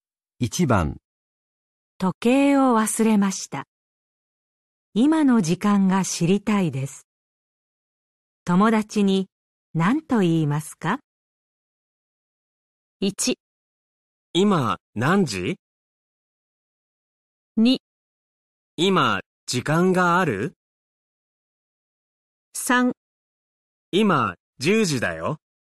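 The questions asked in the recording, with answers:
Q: 時計を忘れました。今の時間が知りたいです。友達に何と言いますか?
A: 1: 今何時?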